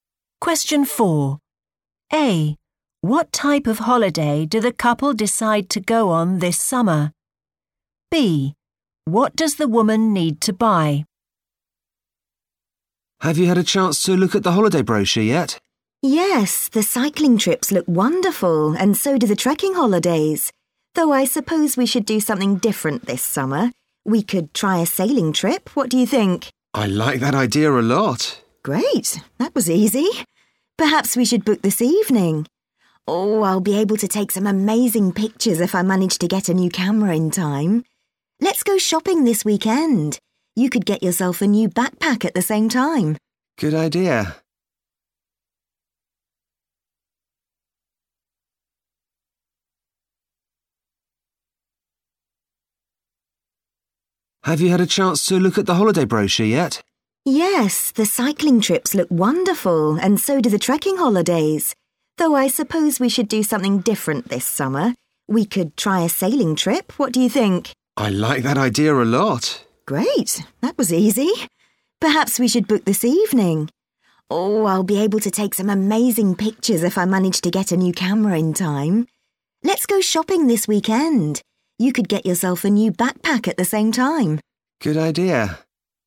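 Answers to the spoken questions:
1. a sailing trip
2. a new camera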